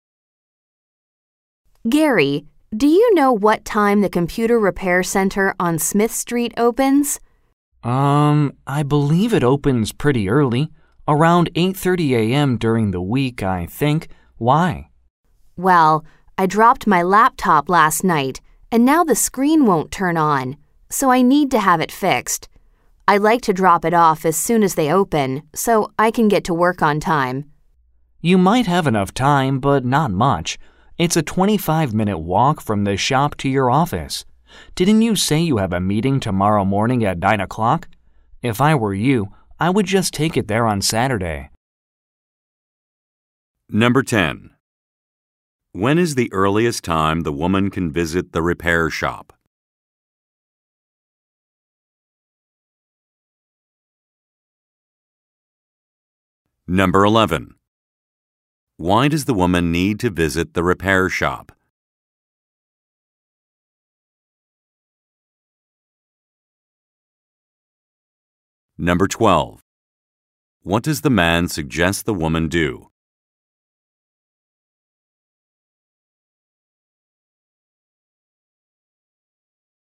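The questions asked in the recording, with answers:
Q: When is the earliest time the woman can visit the repair shop?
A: 8:30 a.m.

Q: Why does the woman need to visit the repair shop?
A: Her laptop screen won't turn on after she dropped it

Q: What does the man suggest the woman do?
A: Take the laptop to the shop on Saturday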